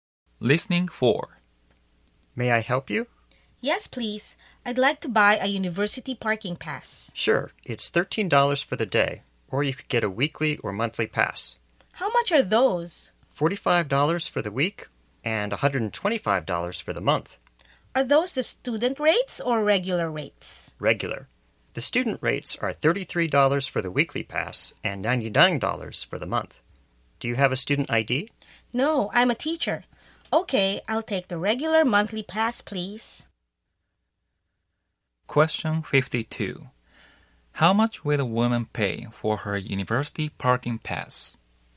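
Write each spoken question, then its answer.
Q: How much will the woman pay for her university parking pass?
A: $125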